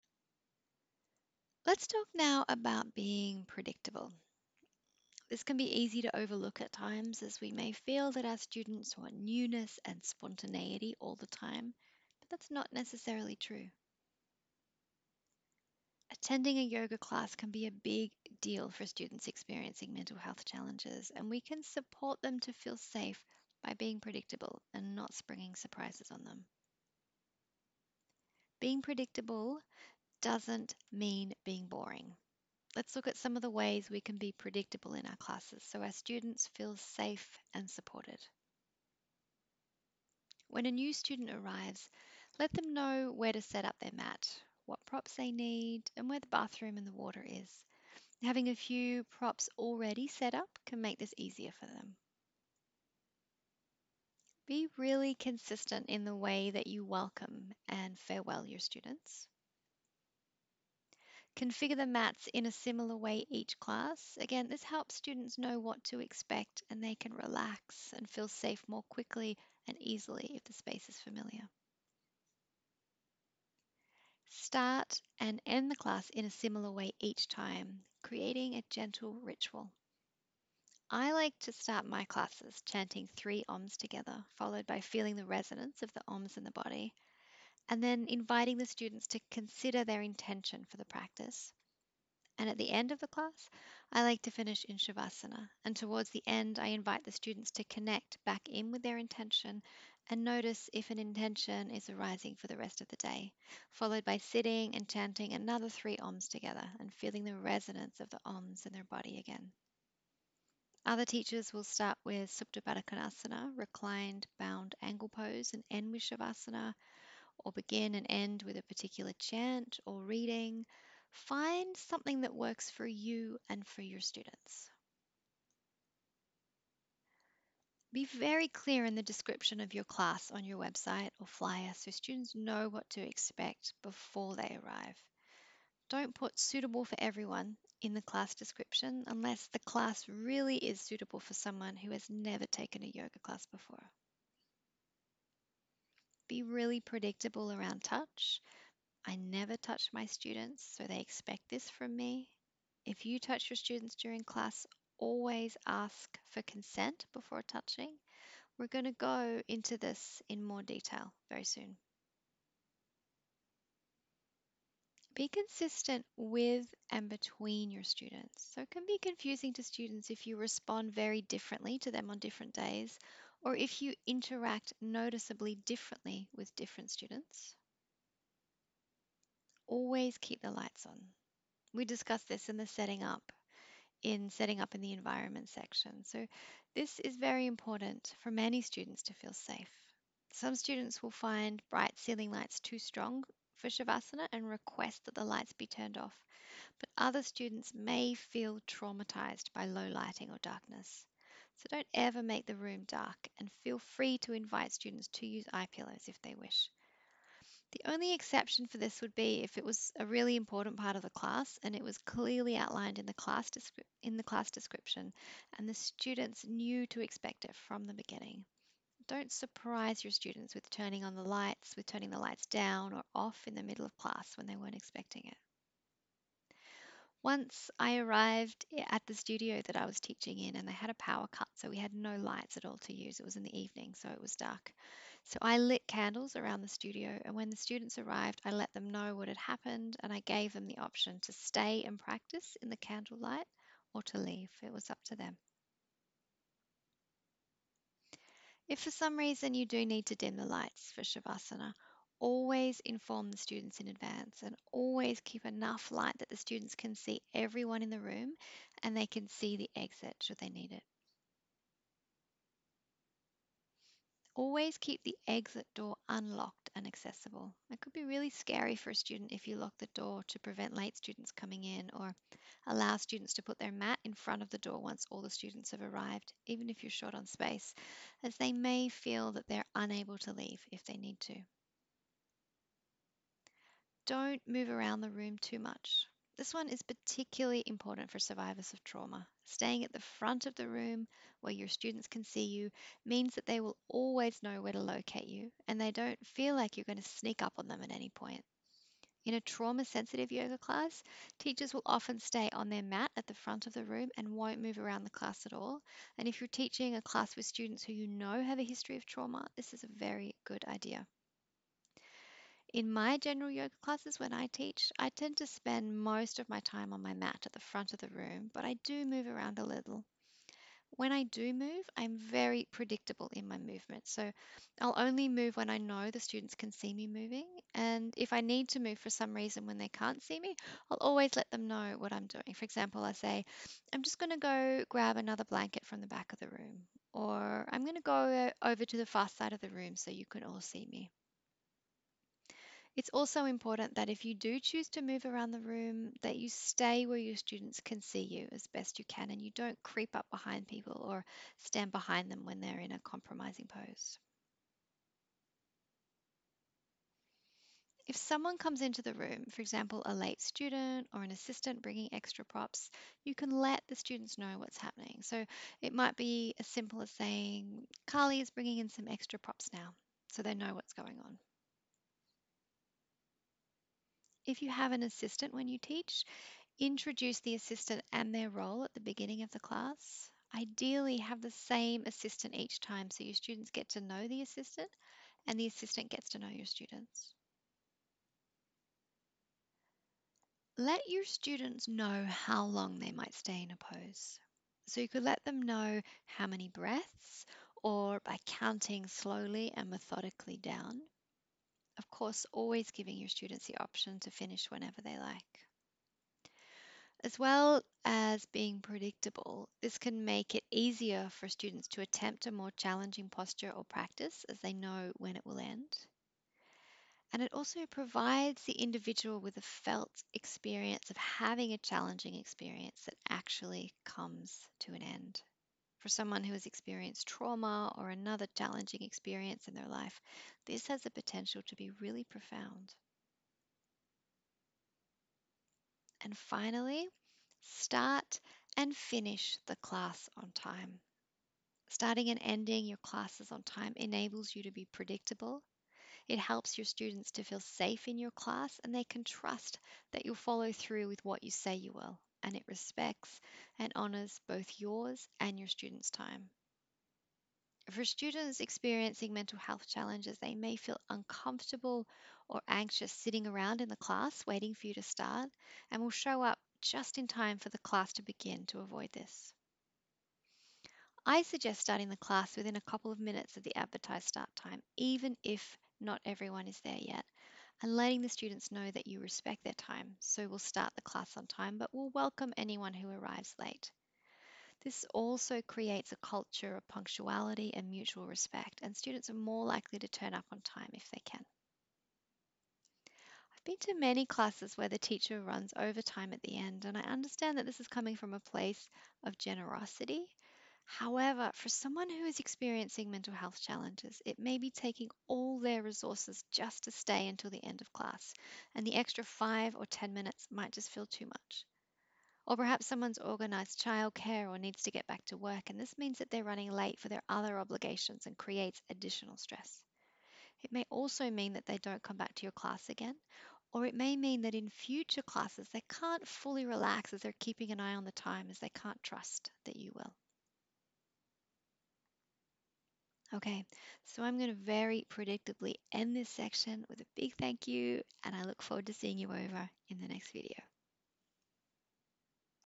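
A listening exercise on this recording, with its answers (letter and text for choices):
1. Why is it important to be predictable?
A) Because yoga is serious and shouldn't be fun and light.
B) Because it helps students to feel safe when they know what to expect.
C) Because Patañjali's Yoga Sūtras states yogaś citta vṛtti nirodhaḥ (I.2); that yoga should be predictable.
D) All of the above.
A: B) Because it helps students to feel safe when they know what to expect.

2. Which of the following are important to consider regarding predictability?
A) Be predictable with touch.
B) Be consistent with and between your students.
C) Be clear in the description of the class so the students know what to expect before they arrive.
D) All of the above.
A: D) All of the above.

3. Why might it be a good idea to let students know how long you will be inviting them to stay in a pose?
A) So they know what to expect.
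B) So they have the experience of a challenging experience that comes to an end.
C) So they feel safe.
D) All of the above.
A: D) All of the above.

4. Why might it be important to start and finish your class on time?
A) It helps students trust that you will follow through on what you say you will.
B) Starting on time helps students who are anxious about attending yoga to arrive as the class starts, so they don't have to sit around and get increasingly anxious waiting for the class to begin.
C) Finishing on time helps students who are using all their resources and courage to stay until the end of class, feel safe with attending and staying until the end.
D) All of the above.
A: D) All of the above.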